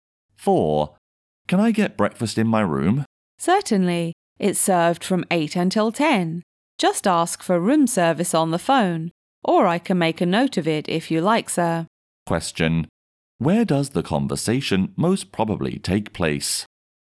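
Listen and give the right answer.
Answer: In a hotel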